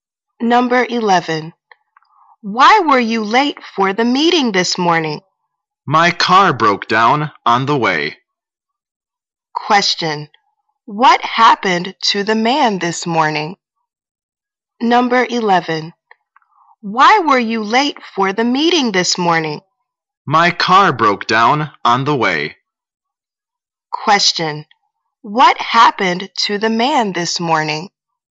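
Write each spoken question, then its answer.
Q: What happened to the man this morning?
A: His car broke down on the way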